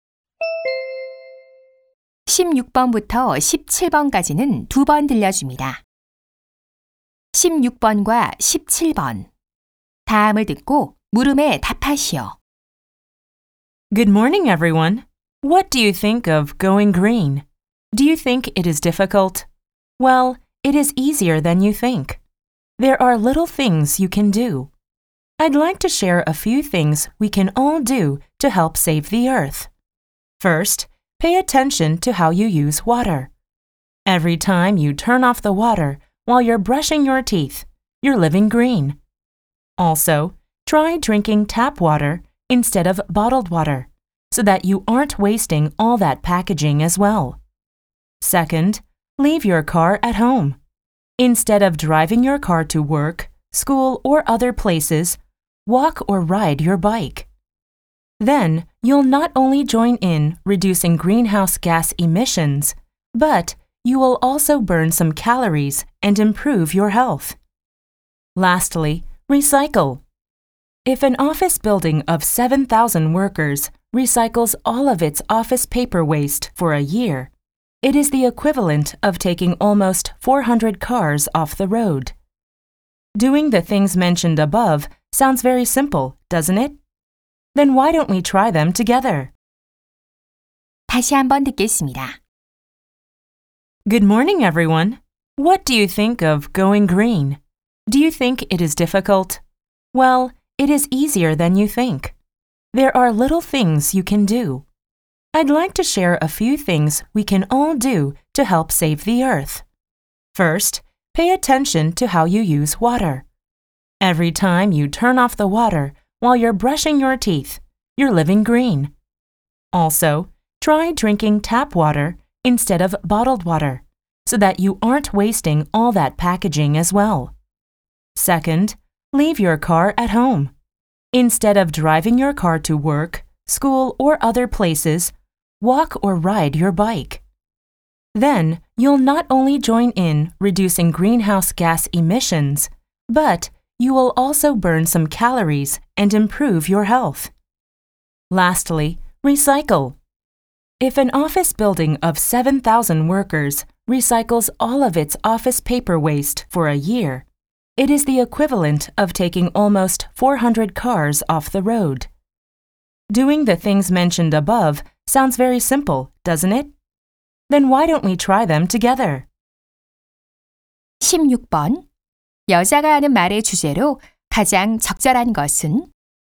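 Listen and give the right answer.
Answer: 환경 보호를 위해 일상에서 실천할 수 있는 간단한 방법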